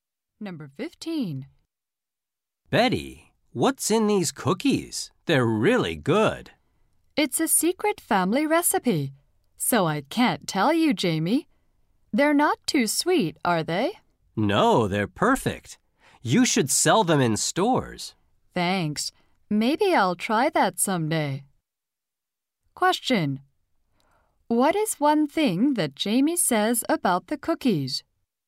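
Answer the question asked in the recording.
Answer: They are really good; Betty should sell them in stores.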